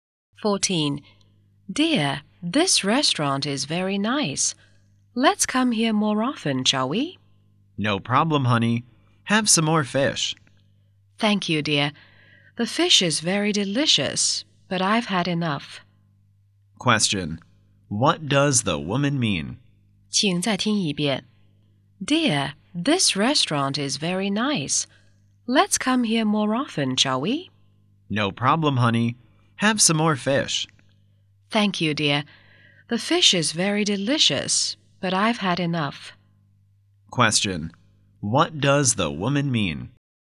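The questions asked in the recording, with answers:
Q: What does the woman mean?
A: She has had enough and doesn't want more fish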